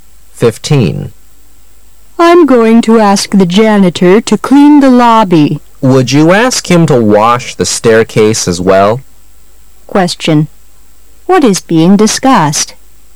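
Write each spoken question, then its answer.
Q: What is being discussed?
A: Cleaning the lobby and staircase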